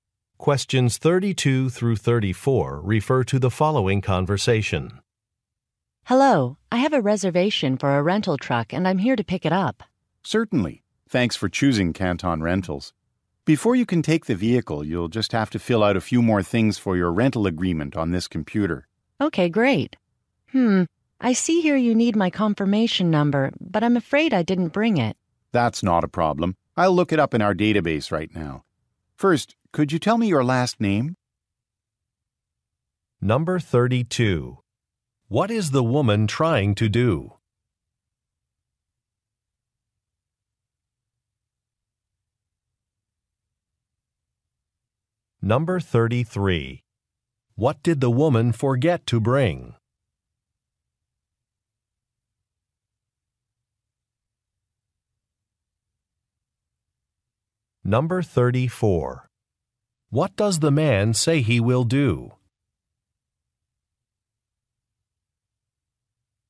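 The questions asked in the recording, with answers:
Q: What is the woman trying to do?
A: Pick up a rental truck

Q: What did the woman forget to bring?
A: Her confirmation number

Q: What does the man say he will do?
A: Look up her information in the database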